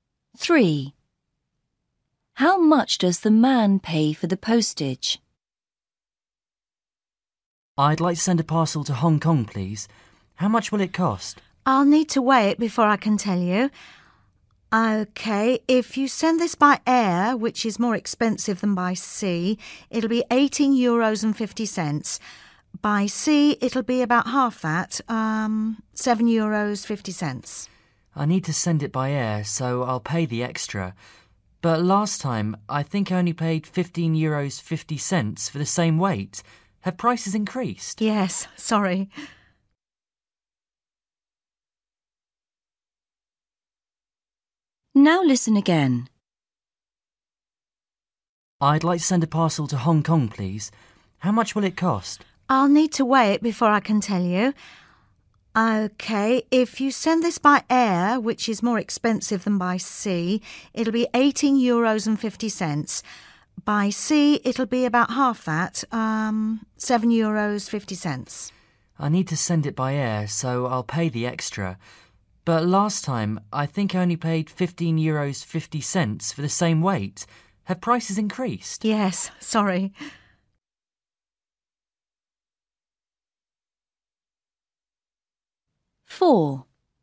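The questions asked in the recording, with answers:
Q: How much does the man pay for the postage?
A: €18.50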